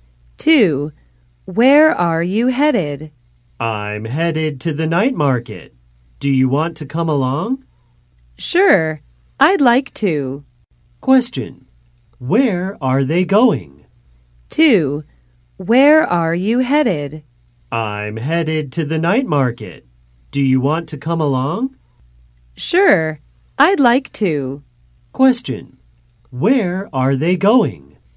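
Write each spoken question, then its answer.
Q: Where are they going?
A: To the night market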